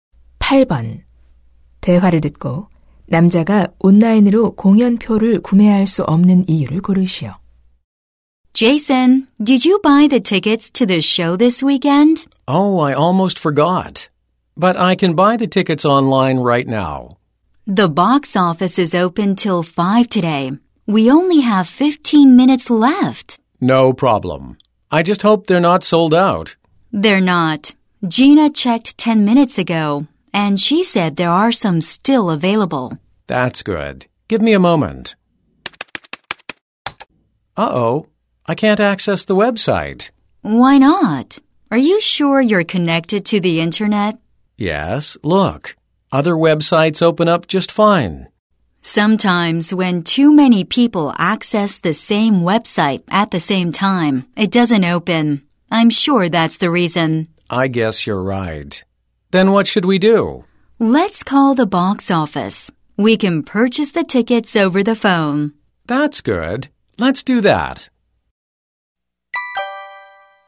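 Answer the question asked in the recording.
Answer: 동시 접속자가 많아 웹사이트에 접속이 안 돼서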